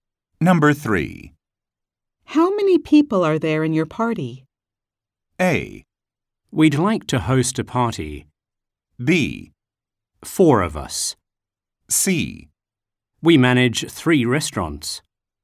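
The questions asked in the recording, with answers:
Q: How many people are there in your party?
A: B: 4 of us.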